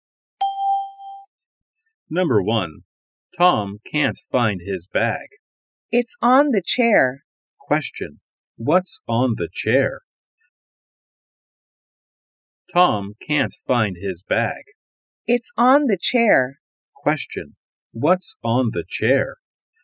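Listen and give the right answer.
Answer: Tom's bag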